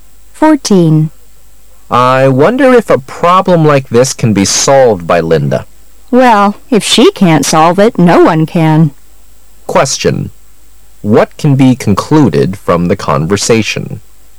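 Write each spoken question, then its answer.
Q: What can be concluded from the conversation?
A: Linda is very good at solving problems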